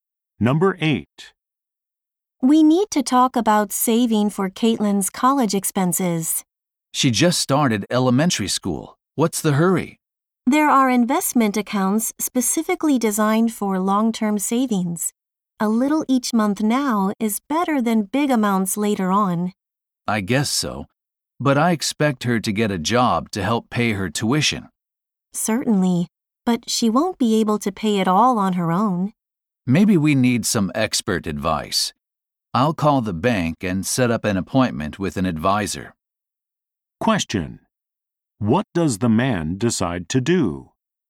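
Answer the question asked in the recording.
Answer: Make an appointment with a bank advisor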